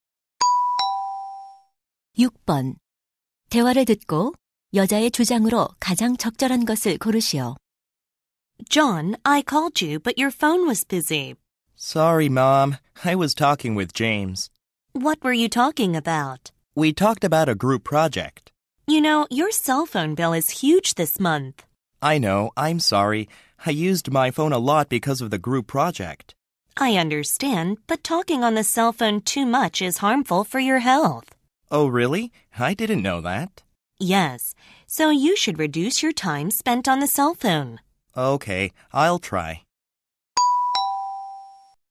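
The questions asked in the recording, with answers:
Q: 대화를 듣고 여자의 주장으로 가장 적절한 것을 고르시오.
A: 휴대전화 사용 시간을 줄여야 한다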